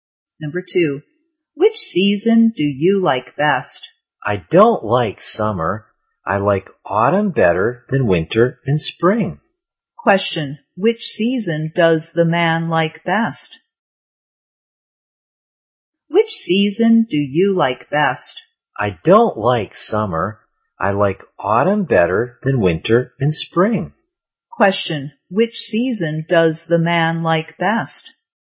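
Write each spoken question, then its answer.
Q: which season does the man like best?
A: Autumn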